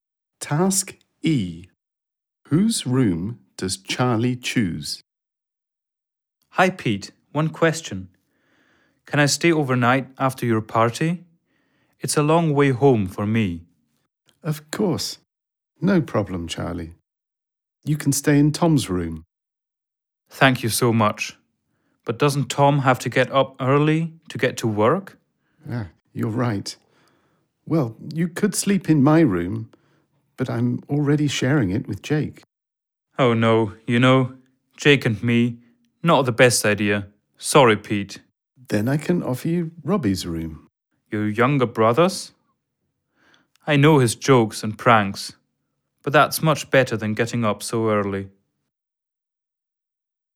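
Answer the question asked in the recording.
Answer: Robbie's room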